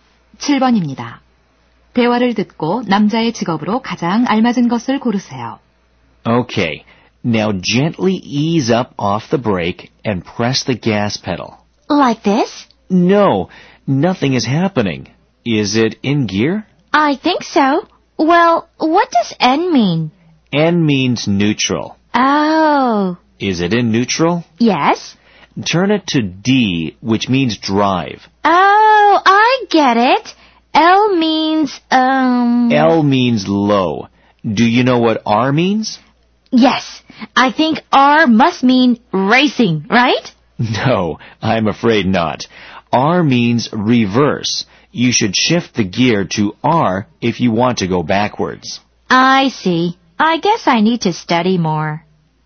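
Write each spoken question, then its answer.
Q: 대화를 듣고 남자의 직업으로 가장 알맞은 것을 고르세요.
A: 운전 강사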